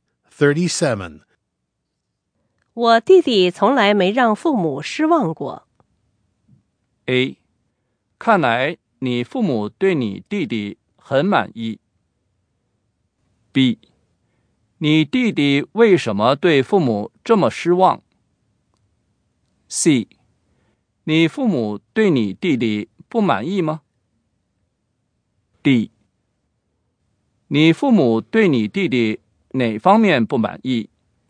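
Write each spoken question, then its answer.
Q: 我弟弟从来没让父母失望过。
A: A: 看来你父母对你弟弟很满意。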